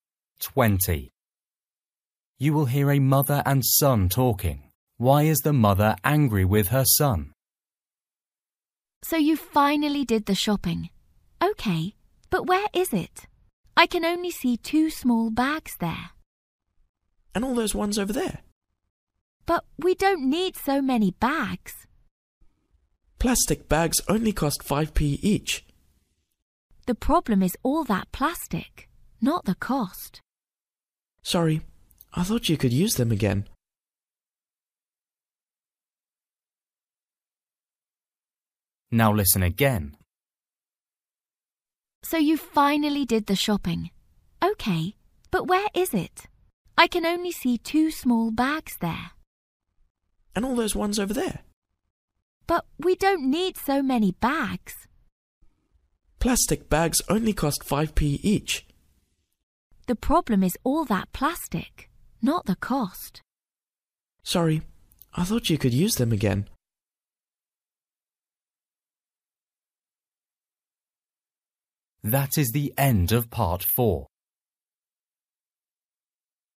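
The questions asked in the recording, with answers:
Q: Why is the mother angry with her son?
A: He got too many plastic bags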